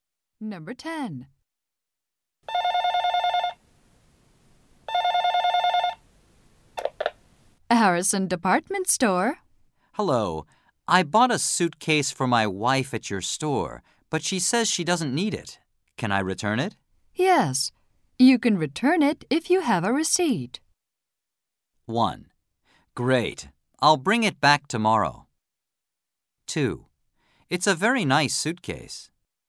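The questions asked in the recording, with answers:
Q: Yes. You can return it if you have a receipt.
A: 1: Great. I'll bring it back tomorrow.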